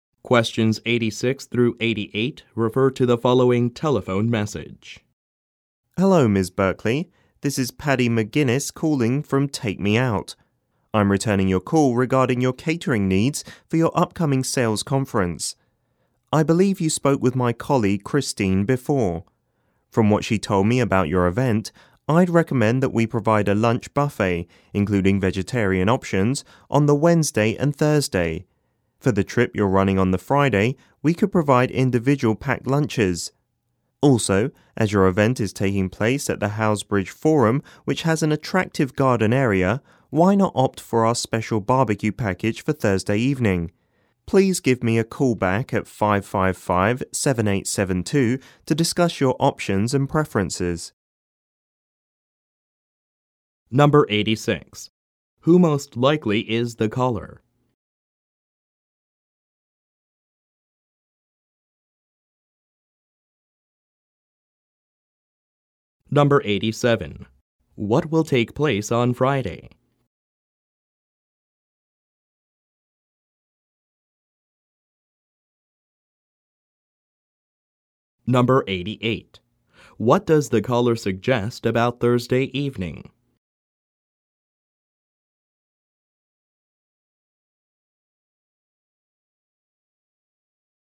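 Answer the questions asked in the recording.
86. A caterer (from Take Me Out catering)
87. A trip
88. Having a special barbecue package in the garden area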